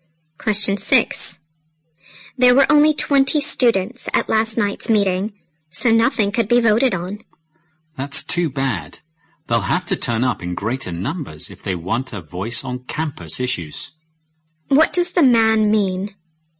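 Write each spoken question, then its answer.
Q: What does the man mean?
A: More students must attend if they want a say on campus issues.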